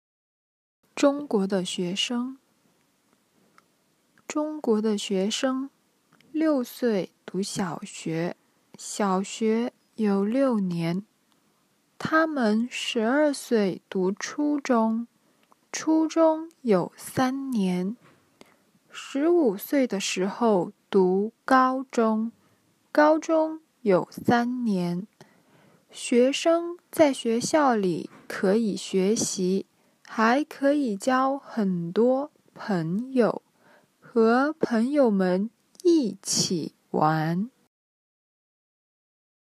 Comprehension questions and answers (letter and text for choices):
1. 中国的学生几岁读小学?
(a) 三岁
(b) 四岁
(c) 五岁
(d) 六岁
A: (d) 六岁

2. 中国的小学有几年?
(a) 四年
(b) 五年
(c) 六年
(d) 七年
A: (c) 六年

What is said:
中国的学生 中国的学生,六岁读小学,小学有六年。 他们十二岁读初中,初中有三年。 十五岁的时候读高中,高中有三年。 学生在学校里可以学习,还可以交很多朋友,和朋友们一起玩。